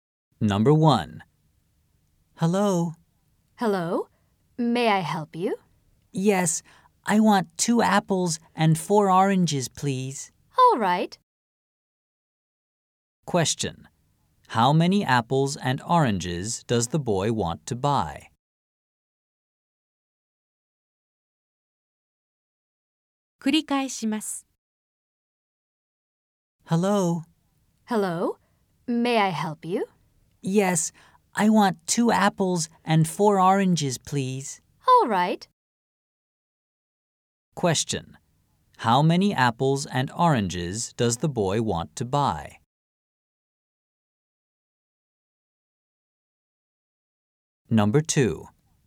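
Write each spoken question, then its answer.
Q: How many apples and oranges does the boy want to buy?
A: 2 apples and 4 oranges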